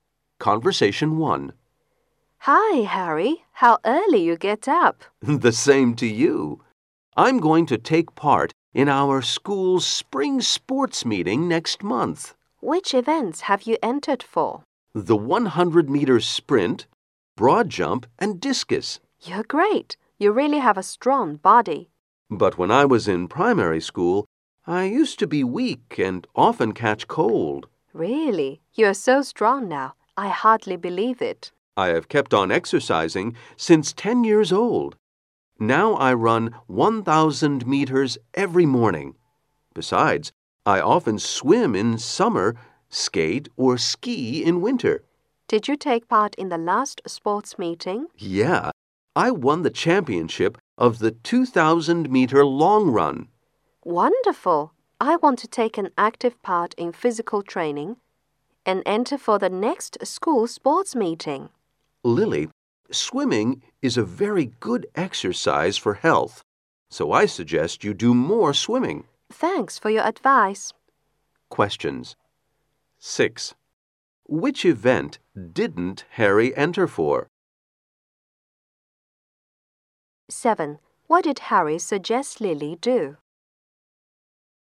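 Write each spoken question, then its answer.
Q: What did Harry suggest Lily do?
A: Do more swimming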